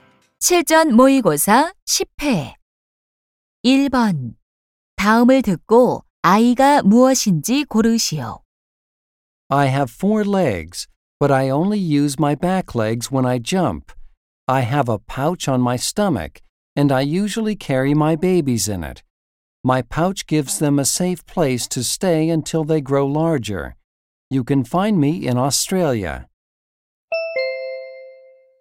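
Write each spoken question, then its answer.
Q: 다음을 듣고 아이가 무엇인지 고르시오.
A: 캥거루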